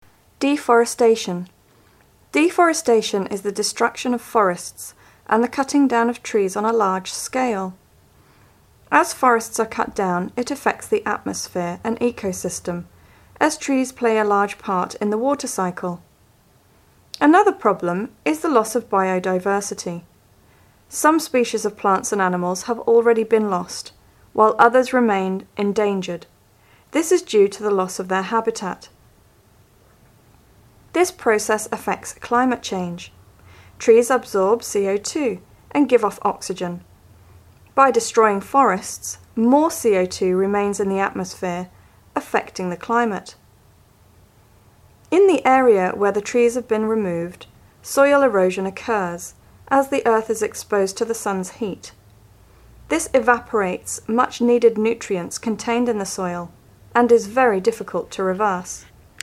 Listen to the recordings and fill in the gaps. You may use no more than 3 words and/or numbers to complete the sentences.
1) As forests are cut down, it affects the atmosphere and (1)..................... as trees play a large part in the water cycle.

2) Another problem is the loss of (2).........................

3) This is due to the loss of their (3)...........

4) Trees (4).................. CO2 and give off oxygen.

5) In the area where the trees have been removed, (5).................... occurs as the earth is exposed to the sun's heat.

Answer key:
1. ecosystem
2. biodiversity
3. habitat
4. absorb
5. soil erosion